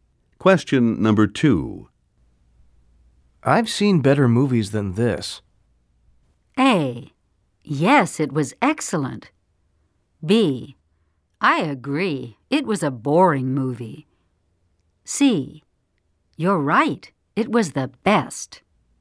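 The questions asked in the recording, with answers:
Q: I've seen better movies than this.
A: B: I agree, it was a boring movie.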